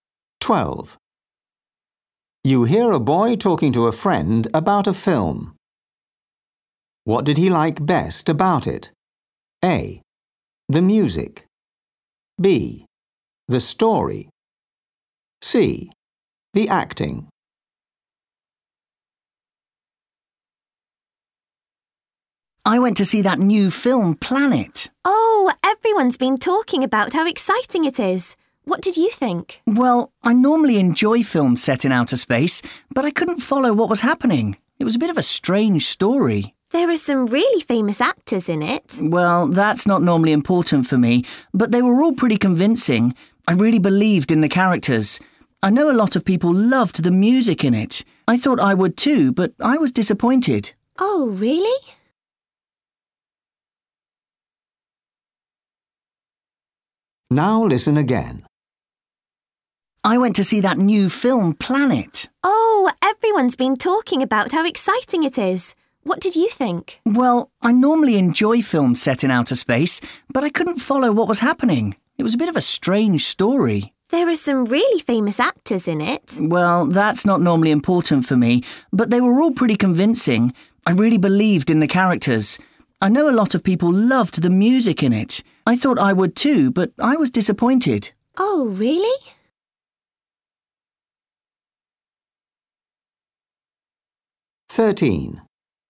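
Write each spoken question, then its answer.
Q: What did he like best about it?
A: C: The acting.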